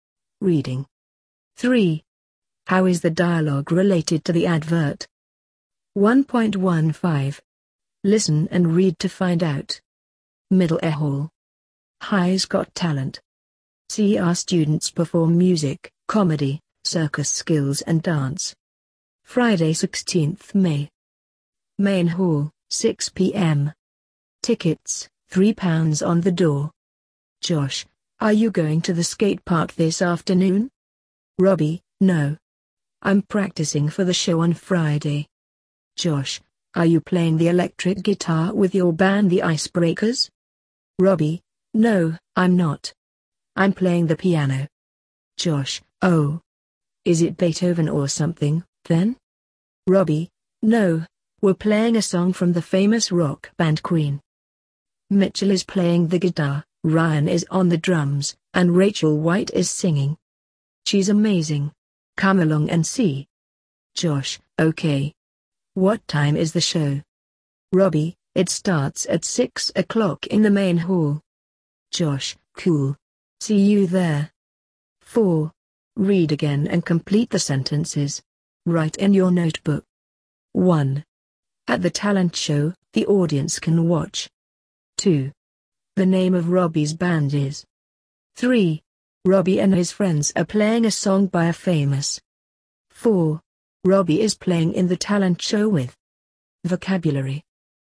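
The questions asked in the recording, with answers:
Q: How is the dialogue related to the advert?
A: Robbie is practising to perform in the school talent show from the advert

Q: At the talent show, the audience can watch.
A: students performing music, comedy, circus skills and dance

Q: The name of Robbie's band is.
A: The Icebreakers

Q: Robbie and his friends are playing a song by a famous.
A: rock band, Queen

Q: Robbie is playing in the talent show with.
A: Mitchell, Ryan and Rachel White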